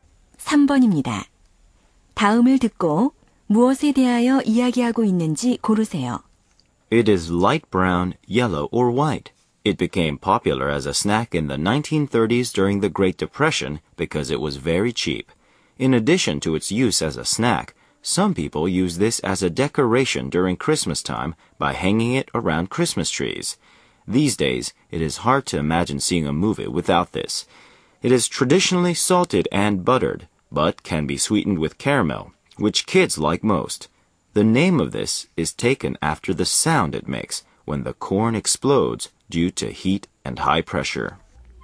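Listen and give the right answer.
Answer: 팝콘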